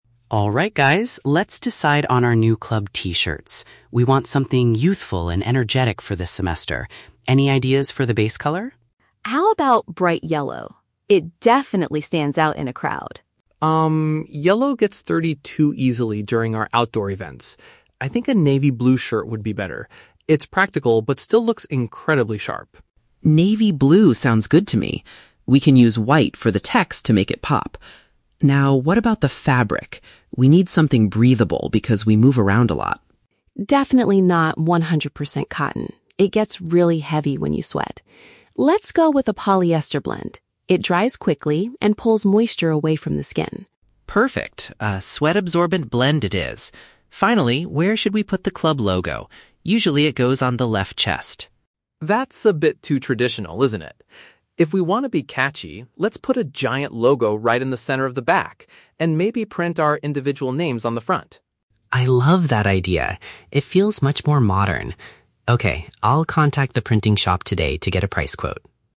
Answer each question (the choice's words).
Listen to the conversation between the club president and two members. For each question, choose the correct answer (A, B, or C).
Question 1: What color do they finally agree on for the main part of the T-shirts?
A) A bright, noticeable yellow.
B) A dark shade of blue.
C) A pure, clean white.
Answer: A dark shade of blue.

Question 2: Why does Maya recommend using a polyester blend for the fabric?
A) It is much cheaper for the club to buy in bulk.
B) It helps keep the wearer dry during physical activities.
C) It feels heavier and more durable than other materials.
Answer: It helps keep the wearer dry during physical activities.

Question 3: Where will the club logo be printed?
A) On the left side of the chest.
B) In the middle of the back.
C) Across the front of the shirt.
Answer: In the middle of the back.

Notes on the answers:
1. Sam suggests "navy blue" (which means a dark shade of blue) because it is practical, and Leo agrees. Option A is a trap; Maya suggests bright yellow, but Sam rejects it because it gets dirty easily. Option C is a trap; white will be used for the text, not the main color of the shirt.
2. Maya states that a polyester blend "dries quickly and pulls moisture away from the skin," which is paraphrased in option B. Option A is not mentioned in the audio. Option C is a trap; Maya says that 100% cotton gets "heavy" when you sweat, which is a negative thing they want to avoid.
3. Sam suggests putting a "giant logo right in the center of the back," and Leo says he loves the idea. Option A is a trap; Leo initially mentions the left chest as the "usual" place, but Sam rejects it as being "too traditional." Option C is a trap; the front of the shirt will be used for their individual names, not the logo.

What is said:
Leo: Alright guys, let's decide on our new club T-shirts. We want something youthful and energetic for this semester. Any ideas for the base color?
Maya: How about bright yellow? It definitely stands out in a crowd.
Sam: Um, yellow gets dirty too easily during our outdoor events. I think a navy blue shirt would be better. It's practical but still looks incredibly sharp.
Leo: Navy blue sounds good to me. We can use white for the text to make it pop. Now, what about the fabric? We need something breathable because we move around a lot.
Maya: Definitely not 100% cotton. It gets really heavy when you sweat. Let's go with a polyester blend. It dries quickly and pulls moisture away from the skin.
Leo: Perfect, a sweat-absorbent blend it is. Finally, where should we put the club logo? Usually, it goes on the left chest.
Sam: That's a bit too traditional, isn't it? If we want to be catchy, let's put a giant logo right in the center of the back, and maybe print our individual names on the front.
Leo: I love that idea! It feels much more modern. Okay, I'll contact the printing shop today to get a price quote.